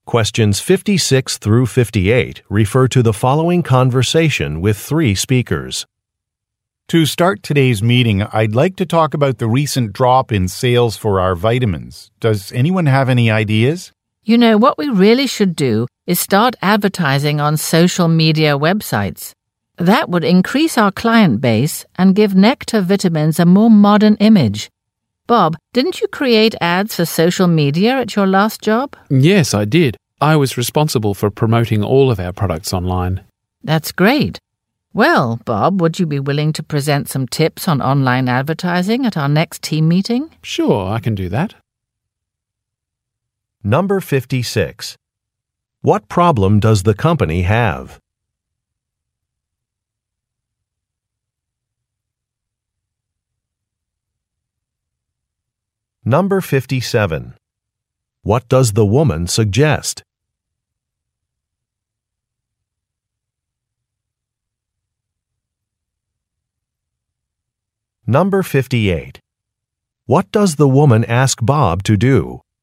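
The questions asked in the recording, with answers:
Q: What problem does the company have?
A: Sales of its vitamins have dropped.

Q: What does the woman suggest?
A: Advertising on social media websites.

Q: What does the woman ask Bob to do?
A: Present tips on online advertising at the next team meeting.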